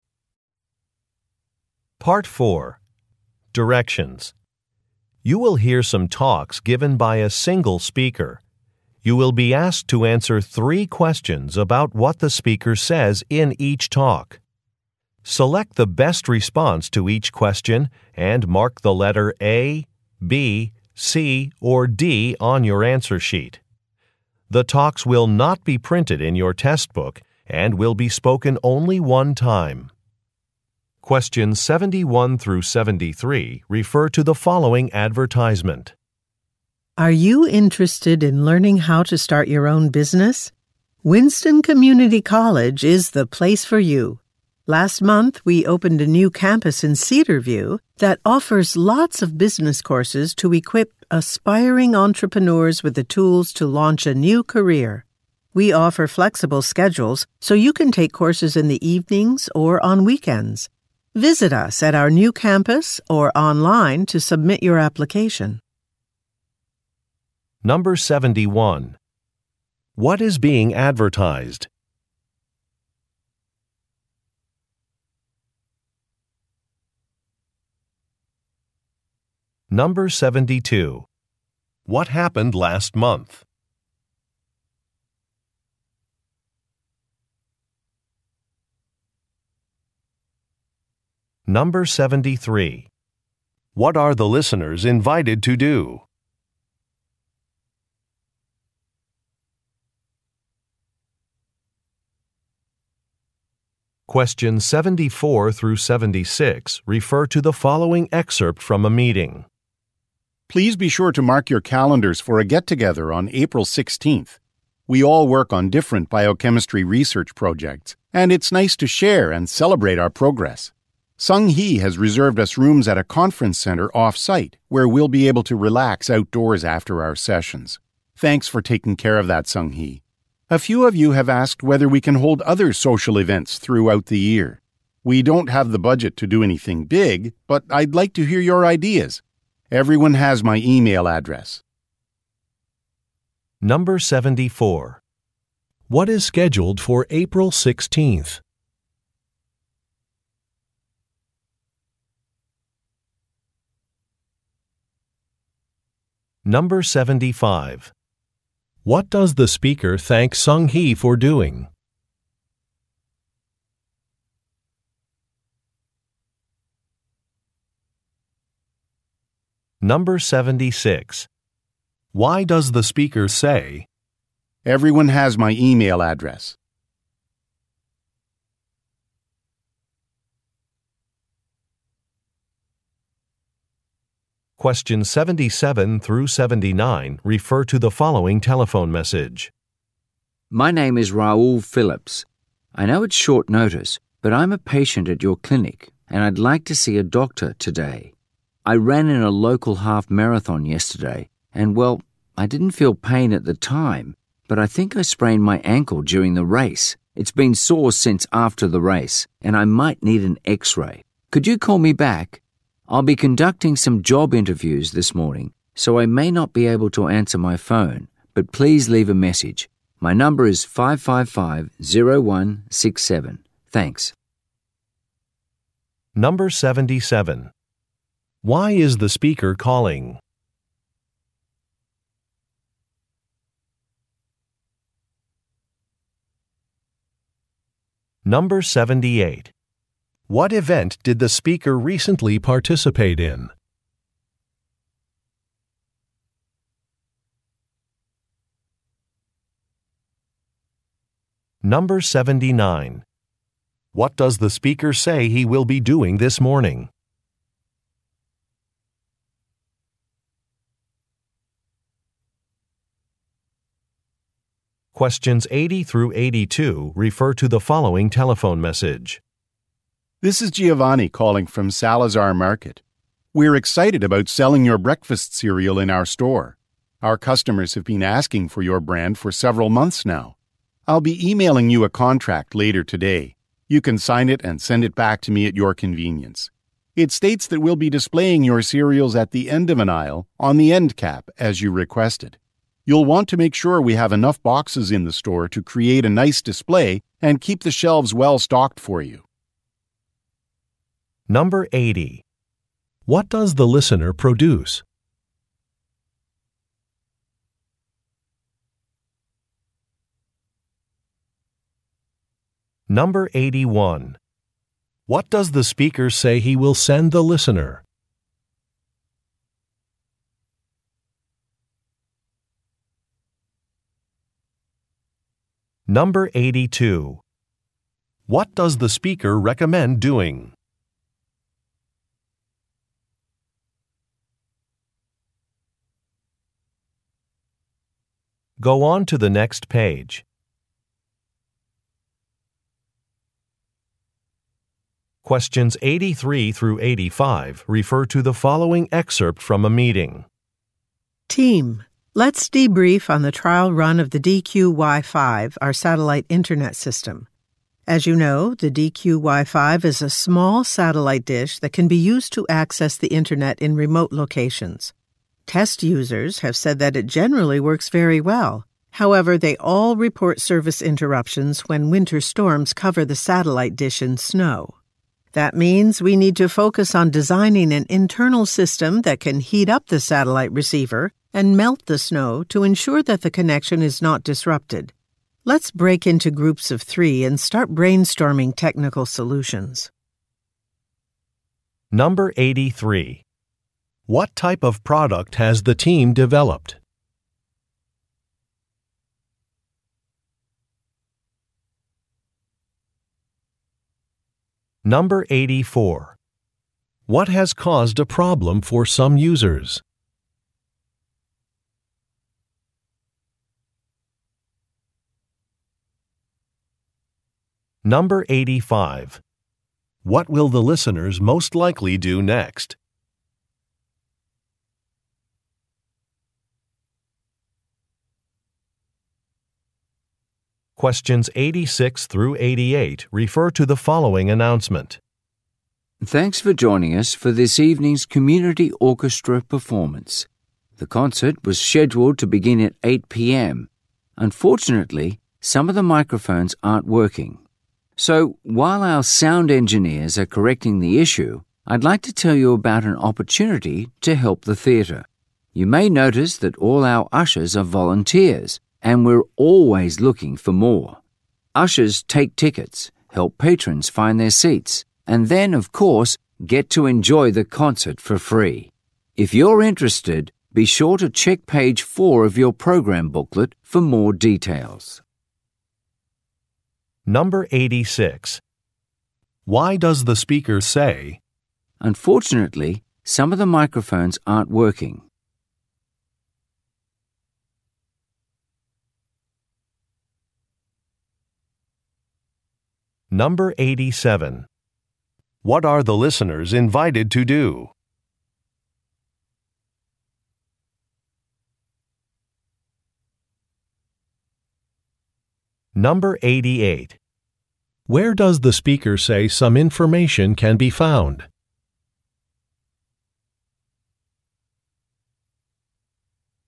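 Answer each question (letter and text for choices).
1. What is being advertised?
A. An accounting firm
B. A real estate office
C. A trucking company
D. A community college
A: D. A community college

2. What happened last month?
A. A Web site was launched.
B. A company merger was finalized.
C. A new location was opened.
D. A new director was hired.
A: C. A new location was opened.

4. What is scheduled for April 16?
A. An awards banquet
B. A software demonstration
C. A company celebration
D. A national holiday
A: C. A company celebration

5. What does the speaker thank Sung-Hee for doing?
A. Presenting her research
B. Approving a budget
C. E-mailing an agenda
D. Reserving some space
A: D. Reserving some space

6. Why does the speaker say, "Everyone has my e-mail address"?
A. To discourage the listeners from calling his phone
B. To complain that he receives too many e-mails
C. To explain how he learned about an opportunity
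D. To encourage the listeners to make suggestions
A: D. To encourage the listeners to make suggestions

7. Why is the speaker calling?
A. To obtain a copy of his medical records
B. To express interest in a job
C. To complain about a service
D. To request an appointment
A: D. To request an appointment

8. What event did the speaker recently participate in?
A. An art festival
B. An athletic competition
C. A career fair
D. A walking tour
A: B. An athletic competition

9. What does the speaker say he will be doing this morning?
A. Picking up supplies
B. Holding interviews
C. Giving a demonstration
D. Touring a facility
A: B. Holding interviews

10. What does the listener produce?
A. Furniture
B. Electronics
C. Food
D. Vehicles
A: C. Food

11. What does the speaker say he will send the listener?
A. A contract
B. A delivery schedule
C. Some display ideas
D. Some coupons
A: A. A contract

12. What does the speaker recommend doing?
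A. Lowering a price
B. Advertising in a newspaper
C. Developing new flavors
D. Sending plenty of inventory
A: D. Sending plenty of inventory

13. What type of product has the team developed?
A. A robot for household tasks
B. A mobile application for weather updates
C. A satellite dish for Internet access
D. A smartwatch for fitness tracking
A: C. A satellite dish for Internet access

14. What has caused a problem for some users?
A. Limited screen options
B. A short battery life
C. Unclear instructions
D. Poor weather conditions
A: D. Poor weather conditions

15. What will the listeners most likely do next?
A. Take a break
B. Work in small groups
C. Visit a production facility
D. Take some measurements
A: B. Work in small groups

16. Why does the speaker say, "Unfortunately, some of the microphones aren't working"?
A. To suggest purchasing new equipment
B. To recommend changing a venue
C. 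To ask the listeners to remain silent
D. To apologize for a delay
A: D. To apologize for a delay

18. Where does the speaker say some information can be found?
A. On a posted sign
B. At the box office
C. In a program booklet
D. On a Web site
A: C. In a program booklet

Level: Nhận biết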